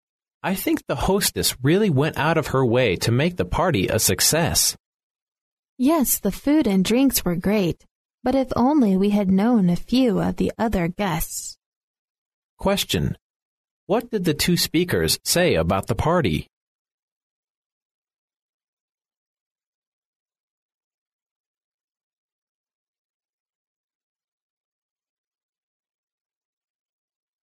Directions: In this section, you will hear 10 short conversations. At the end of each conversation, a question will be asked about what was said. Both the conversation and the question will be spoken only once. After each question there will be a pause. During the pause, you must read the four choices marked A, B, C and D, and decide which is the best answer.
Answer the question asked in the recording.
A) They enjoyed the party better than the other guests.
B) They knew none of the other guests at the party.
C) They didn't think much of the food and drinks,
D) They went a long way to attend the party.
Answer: B) They knew none of the other guests at the party.

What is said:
[听力原文] M: I think the hostess really went out of her way to make the party a success. W: Yes, the food and drinks were great, but if only we had known a few of the other guests. Q: What did the two speakers say about the party?